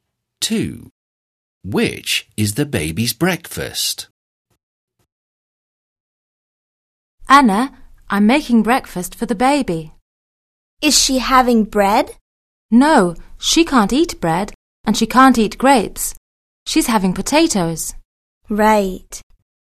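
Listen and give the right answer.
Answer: potatoes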